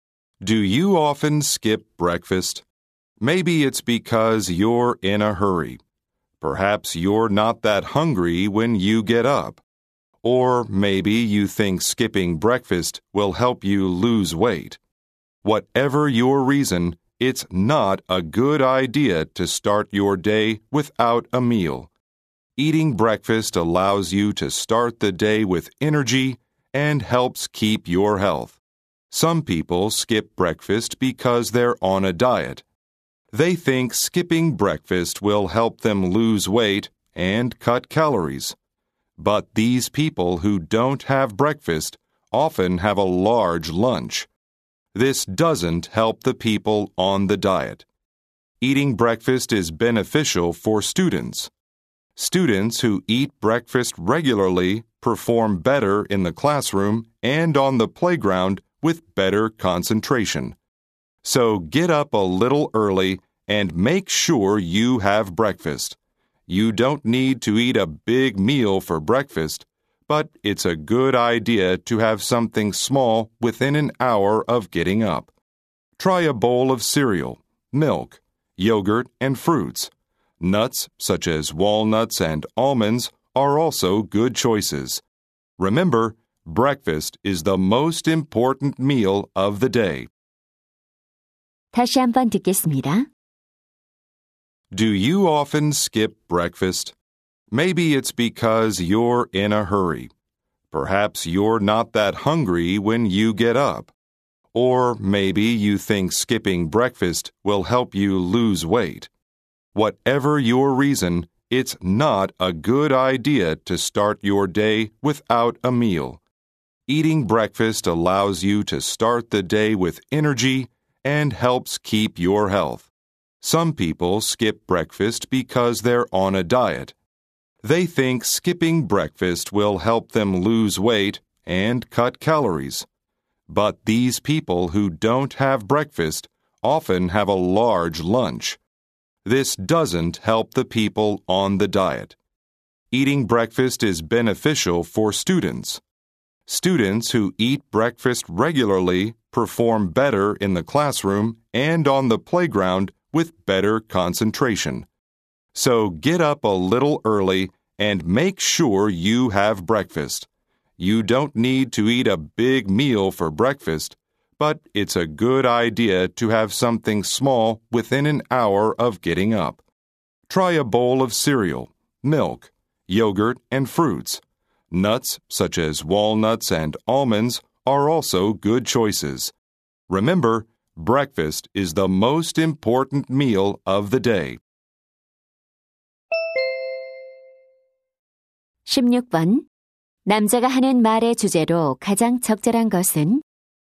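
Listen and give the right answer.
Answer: 아침 식사의 중요성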